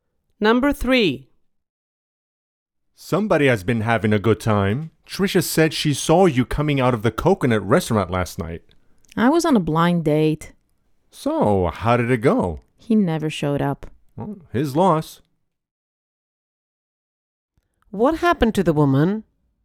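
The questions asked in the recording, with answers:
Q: What happened to the woman?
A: She was stood up on a blind date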